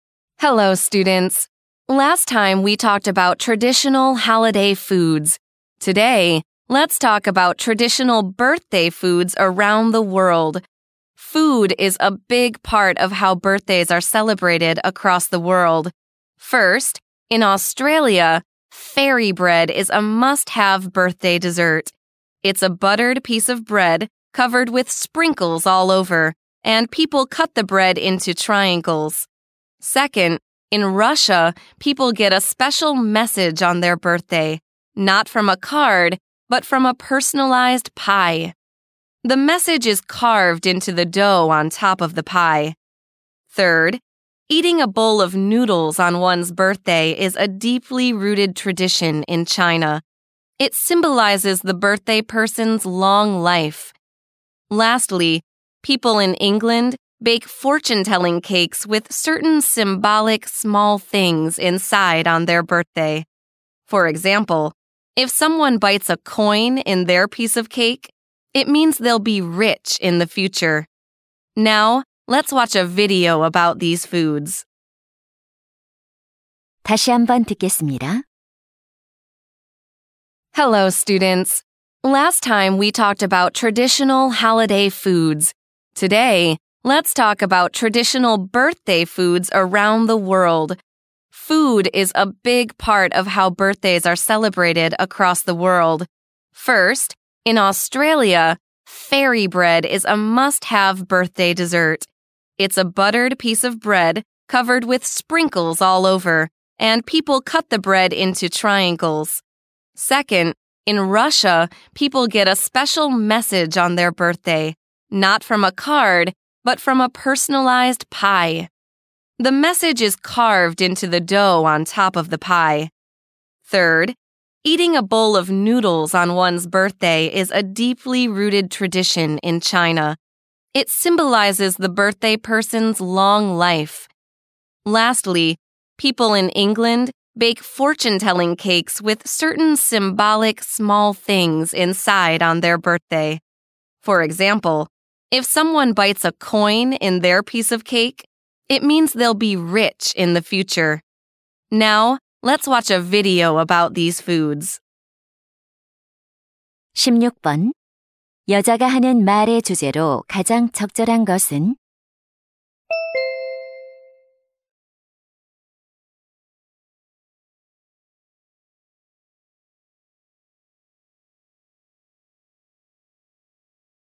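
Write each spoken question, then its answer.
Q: 여자가 하는 말의 주제로 가장 적절한 것은?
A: 세계 여러 나라의 전통 생일 음식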